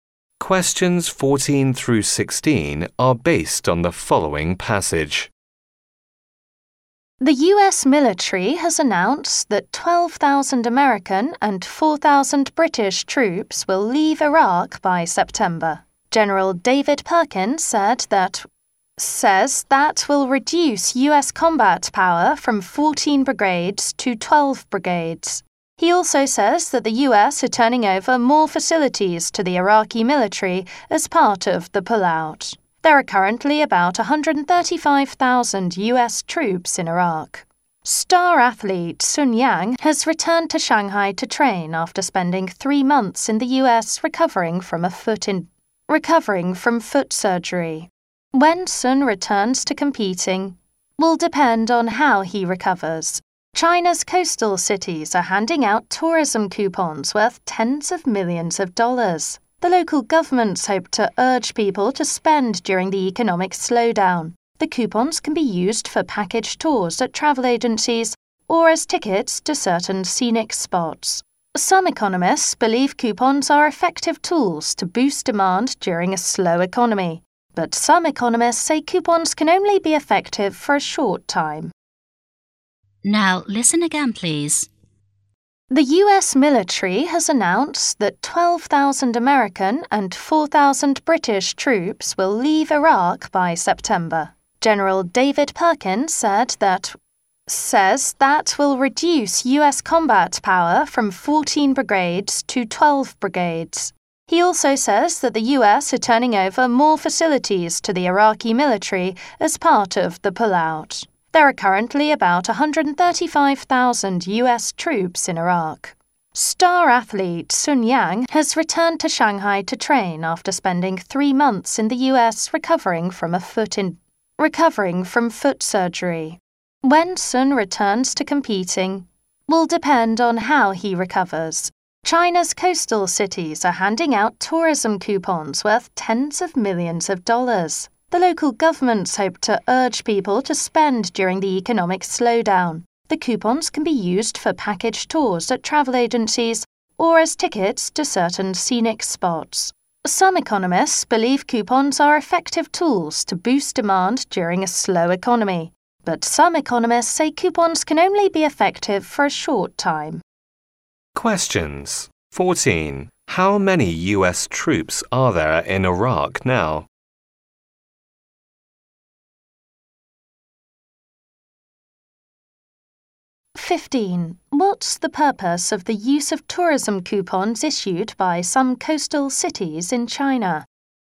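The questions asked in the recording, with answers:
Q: How many US troops are there in Iraq now?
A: About 135,000

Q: What's the purpose of the use of tourism coupons issued by some coastal cities in China?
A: To urge people to spend during the economic slowdown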